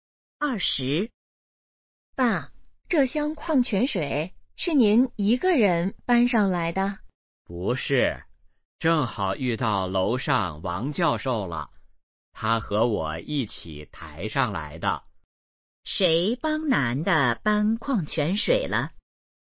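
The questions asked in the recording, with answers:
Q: 谁帮男的搬矿泉水了?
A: 王教授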